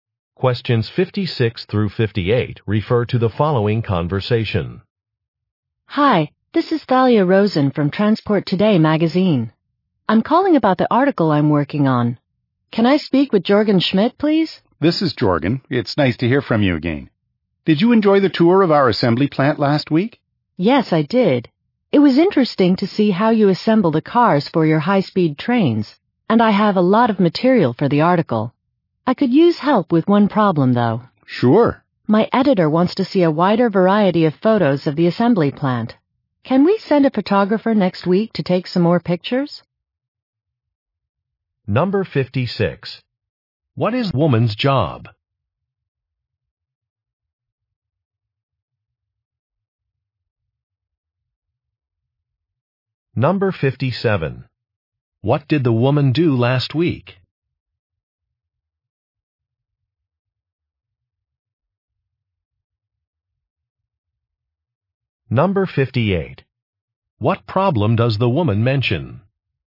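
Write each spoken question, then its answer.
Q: What is woman's job?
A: A magazine writer

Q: What did the woman do last week?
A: She toured an assembly plant

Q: What problem does the woman mention?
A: Her editor wants more varied photos of the plant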